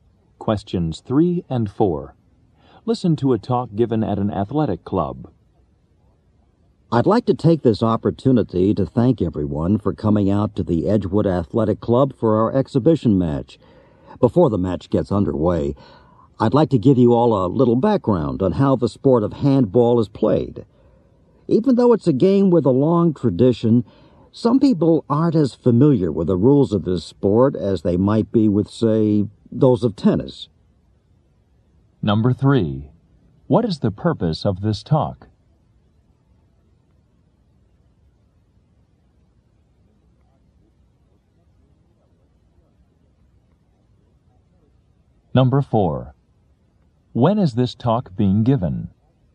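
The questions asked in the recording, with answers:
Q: What is the purpose of this talk?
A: To explain how handball is played

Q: When is this talk being given?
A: Before an exhibition handball match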